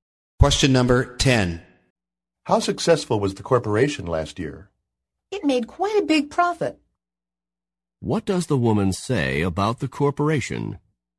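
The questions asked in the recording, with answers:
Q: What does the woman say about the corporation?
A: It made a big profit.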